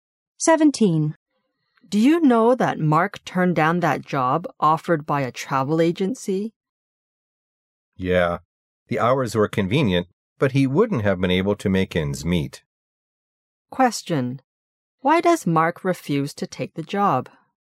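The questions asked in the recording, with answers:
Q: Why does Mark refuse to take the job?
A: The pay wasn't enough for him to make ends meet.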